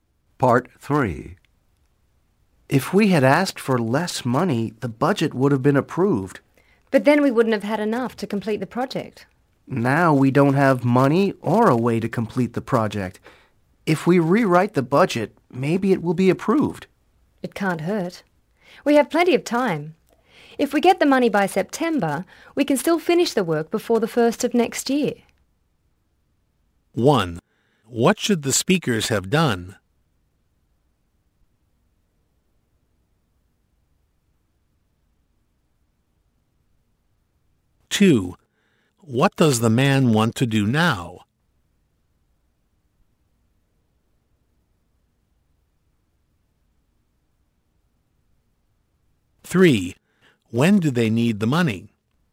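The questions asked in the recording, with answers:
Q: What should the speakers have done?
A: Asked for less money

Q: When do they need the money?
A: By September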